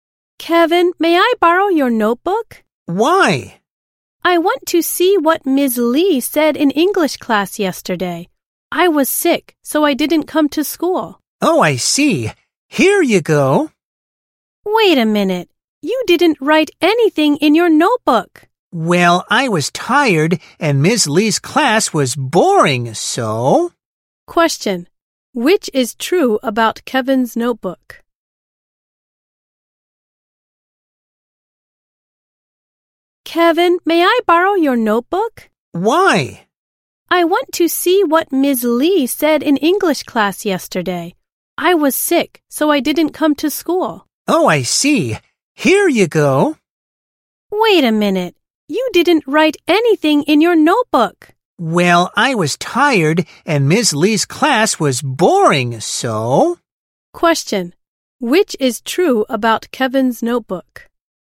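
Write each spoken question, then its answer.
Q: Which is true about Kevin's notebook?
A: Nothing was written in it.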